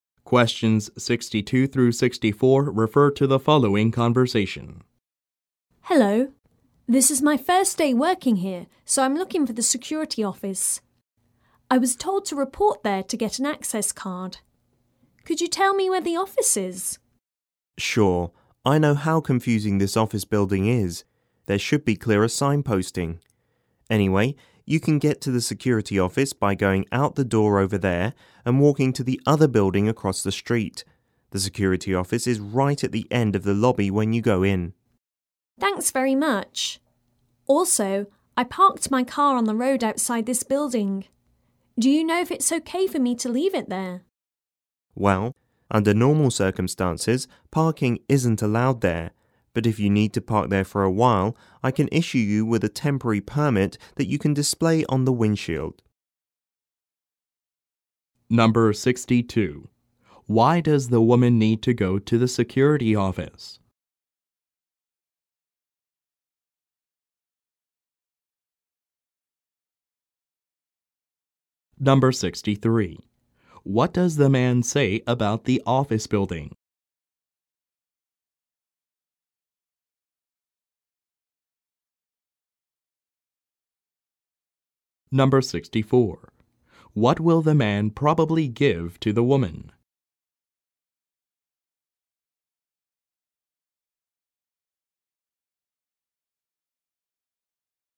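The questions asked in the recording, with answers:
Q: Why does the woman need to go to the security office?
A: To get an access card

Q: What does the man say about the office building?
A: It is confusing; it needs clearer signposting

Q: What will the man probably give to the woman?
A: A temporary parking permit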